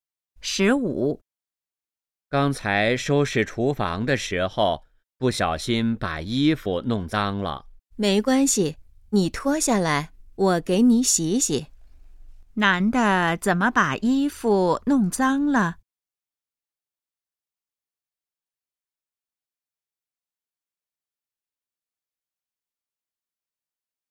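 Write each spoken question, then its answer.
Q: 男的怎么把衣服弄脏了?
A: 收拾厨房时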